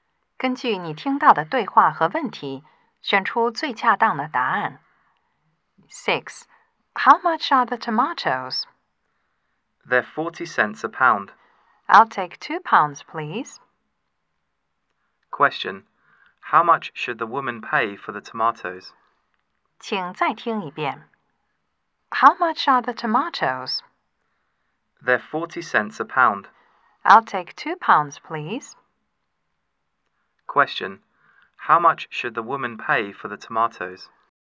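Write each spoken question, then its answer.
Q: How much should the woman pay for the tomatoes?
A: 80 cents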